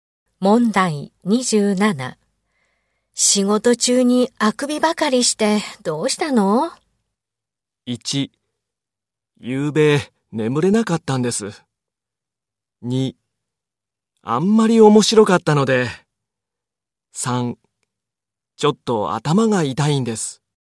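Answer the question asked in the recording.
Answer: 1: ゆうべ眠れなかったんです。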